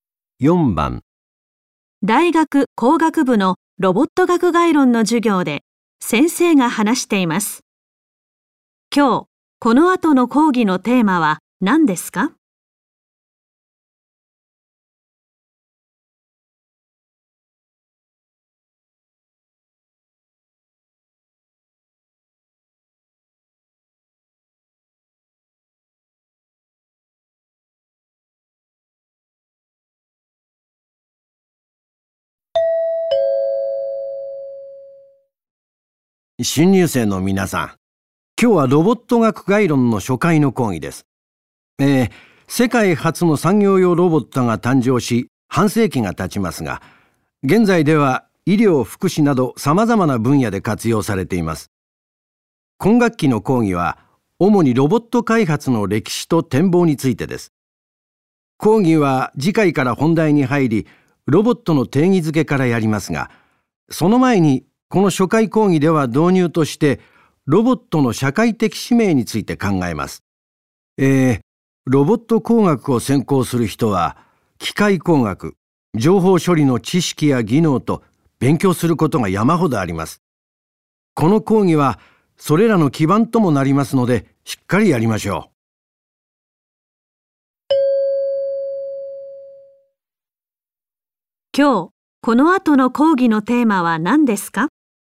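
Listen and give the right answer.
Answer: ロボットの社会的使命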